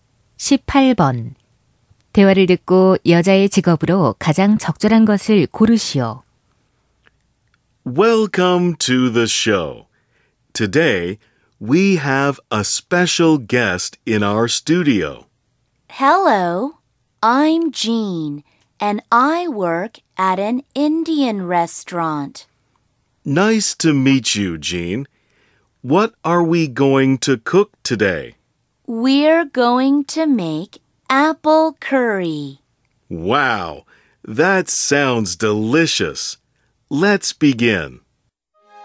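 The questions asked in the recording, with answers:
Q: 대화를 듣고 여자의 직업으로 가장 적절한 것을 고르시오.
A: 요리사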